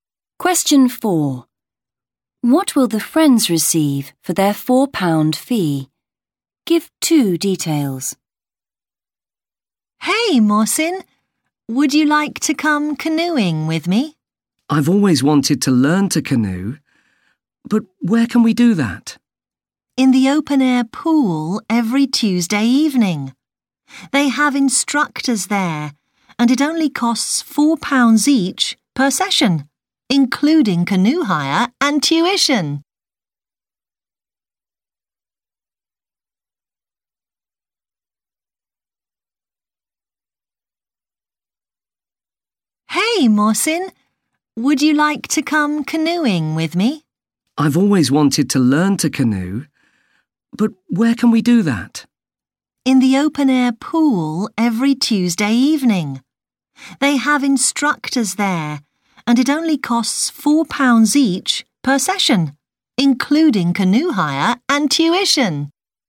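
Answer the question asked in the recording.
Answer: Canoe hire and tuition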